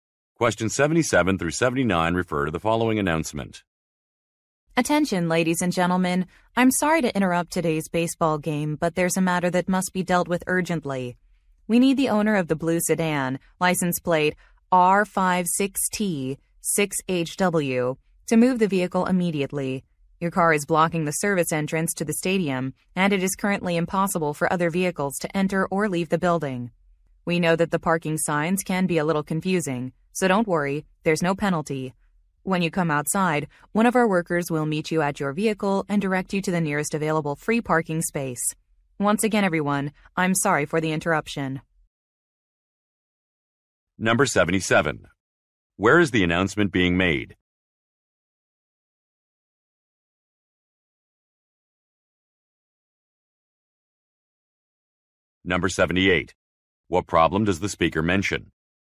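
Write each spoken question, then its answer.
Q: Where is the announcement being made?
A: At a baseball stadium.

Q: What problem does the speaker mention?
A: A car is blocking the service entrance.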